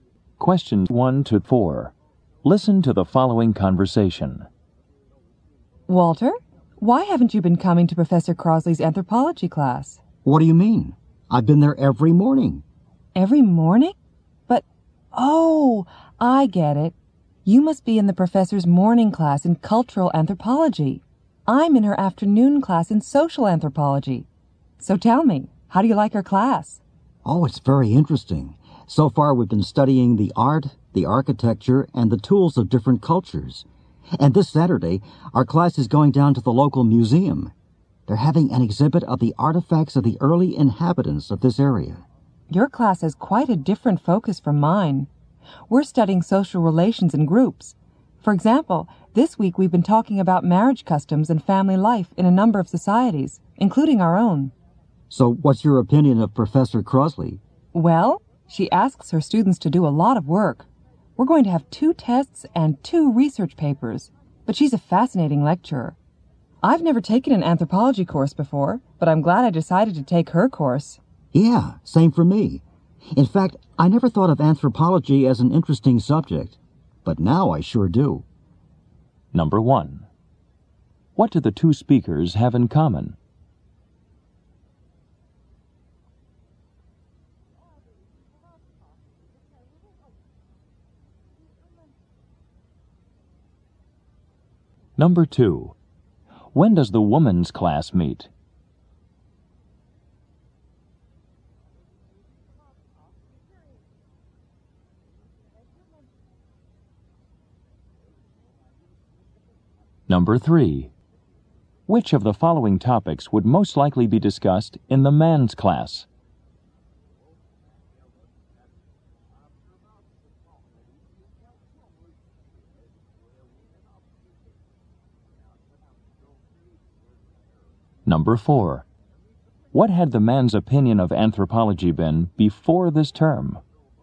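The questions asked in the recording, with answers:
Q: What do the two speakers have in common?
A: They both take Professor Crosley's anthropology course.

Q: When does the woman's class meet?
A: In the afternoon.

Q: Which of the following topics would most likely be discussed in the man's class?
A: Art, architecture, and tools of different cultures.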